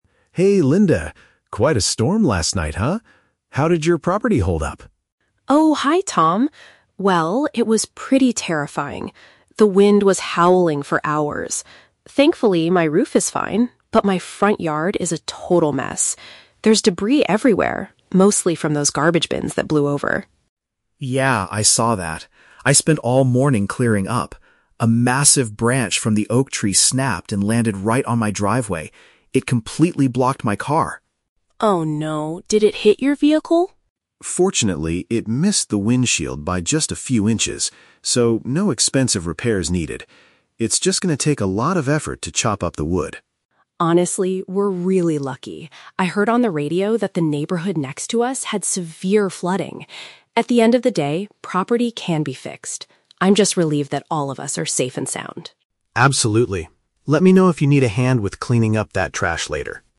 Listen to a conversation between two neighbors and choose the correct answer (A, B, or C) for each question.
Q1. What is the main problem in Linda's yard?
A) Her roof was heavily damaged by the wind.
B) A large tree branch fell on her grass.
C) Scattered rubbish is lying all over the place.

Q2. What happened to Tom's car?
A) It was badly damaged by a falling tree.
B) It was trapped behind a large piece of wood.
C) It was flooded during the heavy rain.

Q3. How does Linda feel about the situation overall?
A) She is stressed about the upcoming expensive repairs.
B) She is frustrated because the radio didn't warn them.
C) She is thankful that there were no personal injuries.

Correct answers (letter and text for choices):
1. C) Scattered rubbish is lying all over the place.
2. B) It was trapped behind a large piece of wood.
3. C) She is thankful that there were no personal injuries.

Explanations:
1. Linda states there is "debris everywhere, mostly from those garbage bins". "Scattered rubbish" is a paraphrase of this information.
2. Tom mentions a "massive branch" (large piece of wood) landed on his driveway and "completely blocked" (trapped) his car.
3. Linda says she is "relieved that all of us are safe and sound". Being "safe and sound" means having no injuries, and "relieved" is a synonym for "thankful".

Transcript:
Tom: Hey Linda. Quite a storm last night, huh? How did your property hold up?
Linda: Oh, hi Tom. Well... it was pretty terrifying. The wind was howling for hours. Thankfully, my roof is fine. But my front yard is a total mess. There's debris everywhere, mostly from those garbage bins that blew over.
Tom: Yeah, I saw that. I spent all morning clearing up. A massive branch from the oak tree snapped and landed right on my driveway. It completely blocked my car.
Linda: Oh no! Did it hit your vehicle?
Tom: Fortunately, it missed the windshield by just a few inches. So, no expensive repairs needed. It's just going to take a lot of effort to chop up the wood.
Linda: Honestly, we're really lucky. I heard on the radio that the neighborhood next to us had severe flooding. At the end of the day, property can be fixed. I'm just relieved that all of us are safe and sound.